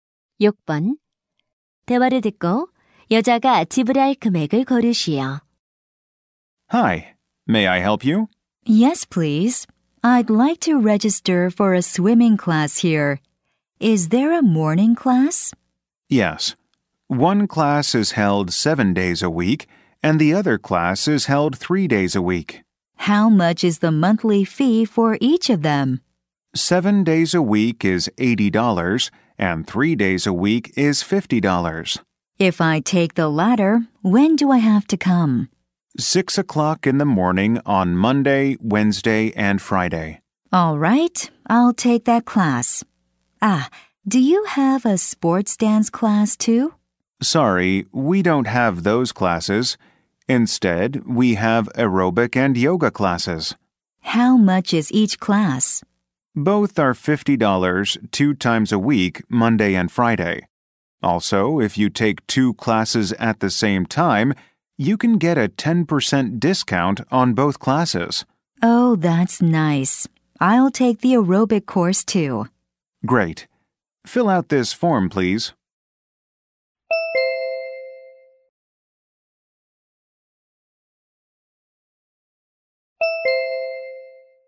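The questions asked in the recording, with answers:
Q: 대화를 듣고 여자가 지불할 금액을 고르시오.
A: $90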